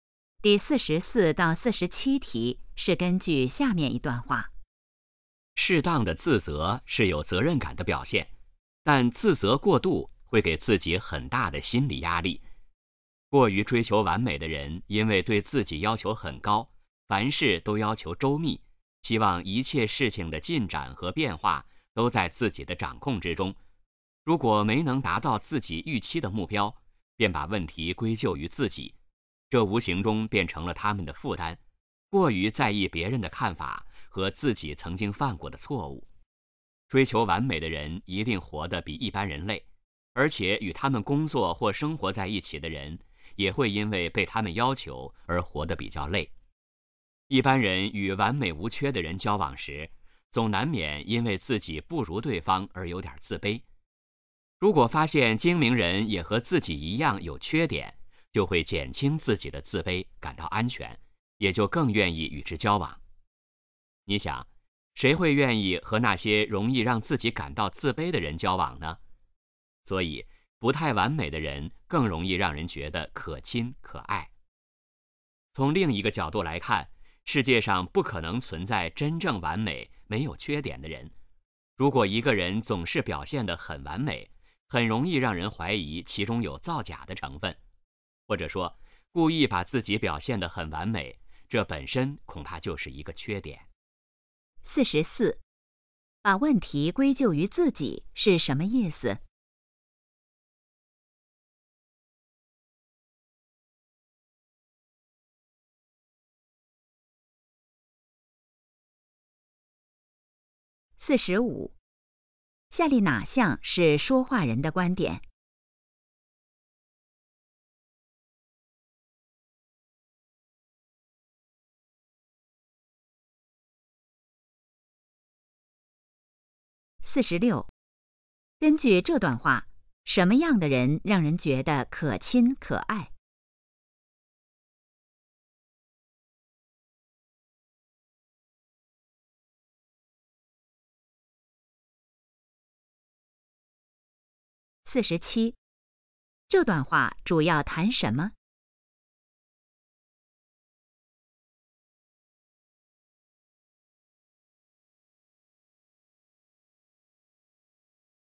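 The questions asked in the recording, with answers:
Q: 把问题归咎于自己是什么意思?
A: 认为问题是自己造成的

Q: 根据这段话,什么样的人让人觉得可亲可爱?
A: 不太完美的人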